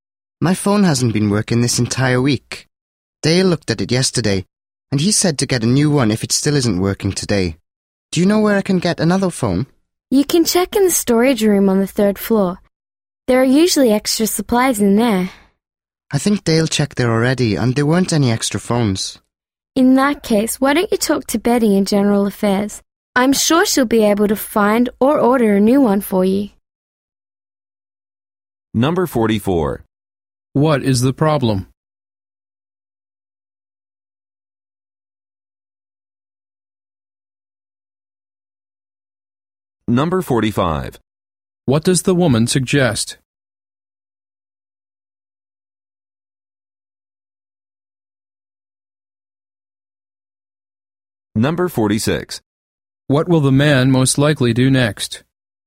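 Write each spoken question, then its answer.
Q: What is the problem?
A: The man's phone isn't working.

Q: What will the man most likely do next?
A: Talk to Betty in General Affairs.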